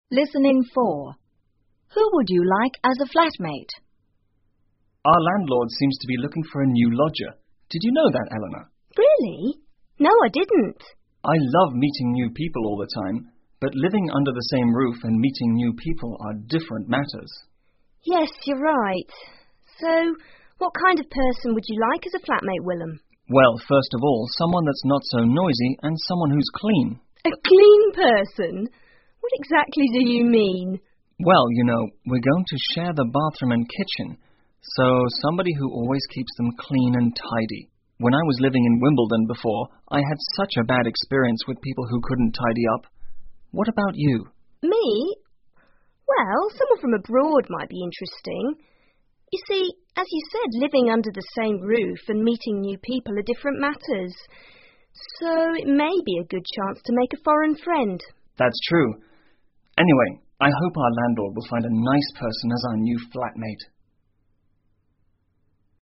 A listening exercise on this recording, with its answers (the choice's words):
根据对话内容, 判断下面的句子是否正确,如果符合对话内容,请在T做记号,如果不符合,请在F做记号。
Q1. Their landlord is looking for a new lodger.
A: T

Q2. They feel comfortable living with new people.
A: F

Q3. They prefer someone from Wimbledon.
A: F

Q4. They couldn't tidy up.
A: F

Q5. They feel living under the same roof and meeting new people are different matters.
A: T

请根据对话内容,选出一个正确的答案。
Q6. What are the speakers talking about?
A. Someone who is kind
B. A new lodger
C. Their landlord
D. Their kitchen and bathroom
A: A new lodger

请再听一次对话,然后回答下面的问题。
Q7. Who is looking for a new lodger?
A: Their landlord

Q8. Why is the man concerned about a new lodger?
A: He thinks living under the same roof and meeting new people are different matters.

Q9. What kind of person does the man prefer as his fltmate?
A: Someone who is clean and not so noisy

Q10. Where has the man had a bad experience regarding a flatmate?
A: In Wimbledon

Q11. Is the woman interested in living with a foreigner?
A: Yes

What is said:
Willem: Our landlord seems to be looking for a new lodger. Did you know that,Eleanor?
Eleanor: Really? No, I didn't.
W: I love meeting new people all the time, but living under the same roof and meeting new people are different matters.
E: Yes, you're right. So what kind of person would like as a flat mate, Willem?
W: Well, first of all, someone that's not so noisy and someone who is clean.
E: A clean person? What exactly do you mean?
W: Well, you know, we're going to share the bathroom and kitchen. So somebody who always keeps them clean and tidy. When I was living in Wimbledon before, I had such a bad experience with people who couldn't tidy up. What about you?
E: Me? Well, someone from abroad might be interesting. So it may be a good chance to make a foreign friend.
W: That's true. Anyway, I hope our landlord will find a nice person as our new flat mate.